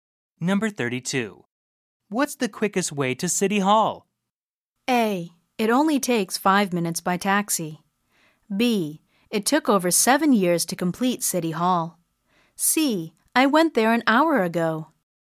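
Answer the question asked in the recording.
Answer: A: It only takes 5 minutes by taxi.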